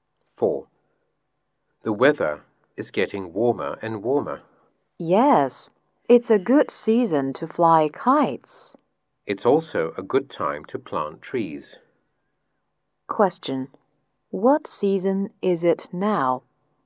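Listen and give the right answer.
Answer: Spring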